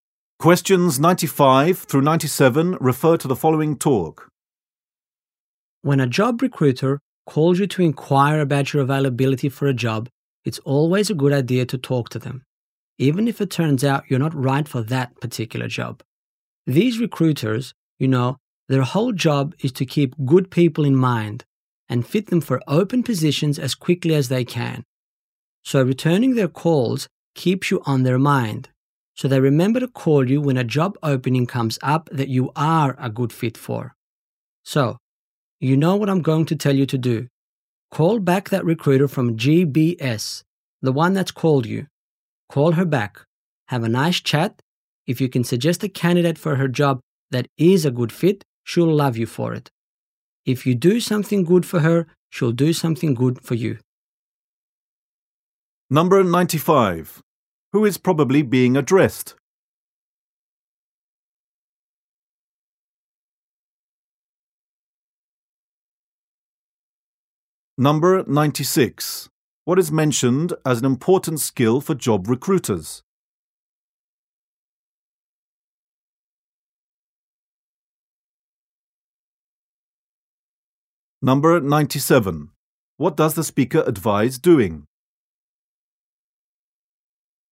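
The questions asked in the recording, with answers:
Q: What does the speaker advise doing?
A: Calling the recruiter back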